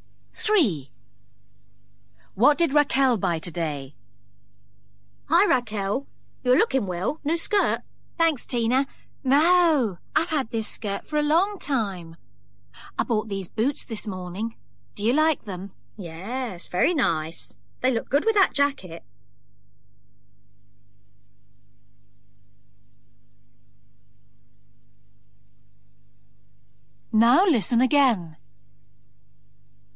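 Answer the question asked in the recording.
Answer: Boots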